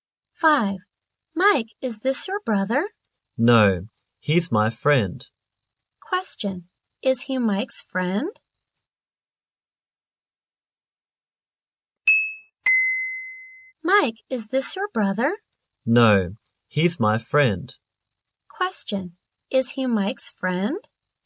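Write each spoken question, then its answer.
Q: is he Mike's friend?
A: Yes, he is.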